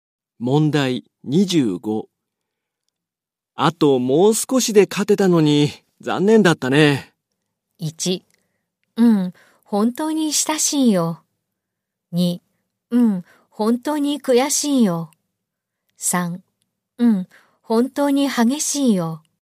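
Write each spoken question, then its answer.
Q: あともう少しで勝てたのに残念だったね。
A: 2: うん、本当に悔しいよ。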